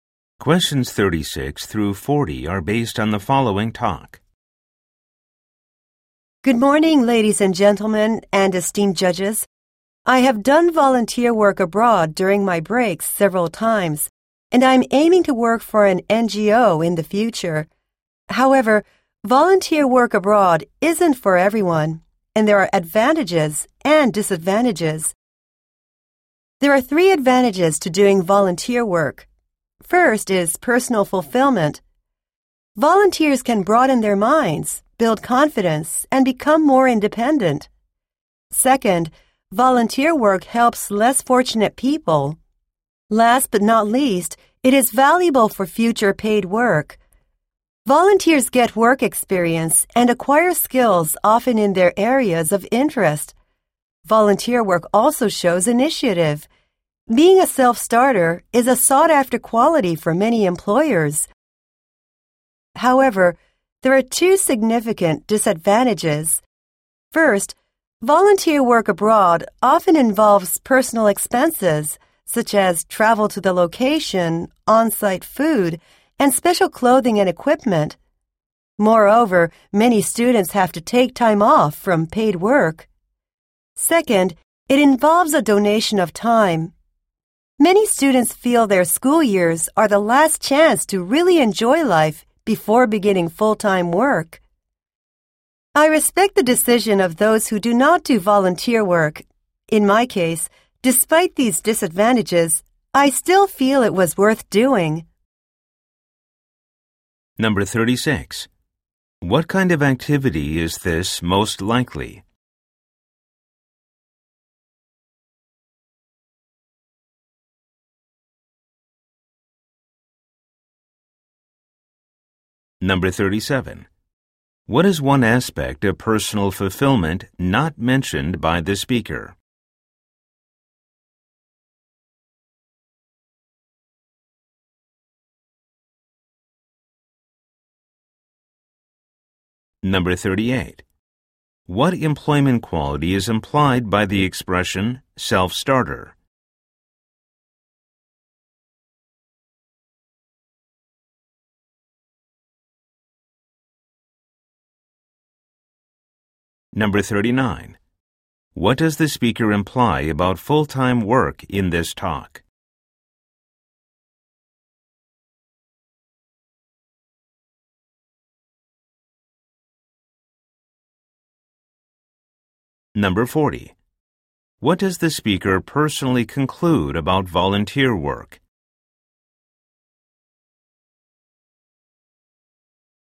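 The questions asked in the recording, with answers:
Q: What kind of activity is this most likely?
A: A speech contest

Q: What does the speaker personally conclude about volunteer work?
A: It was worth doing despite the disadvantages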